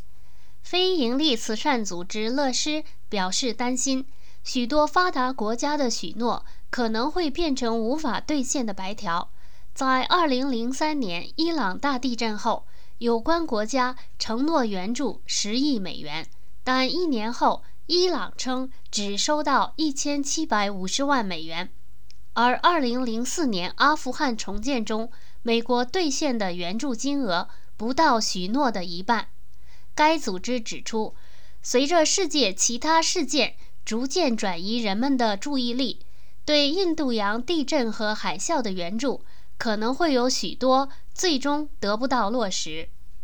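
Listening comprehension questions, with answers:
Please answer the following questions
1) 大地震一年后,伊朗实际收到了多少援助?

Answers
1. 1750万美元

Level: 3rd Year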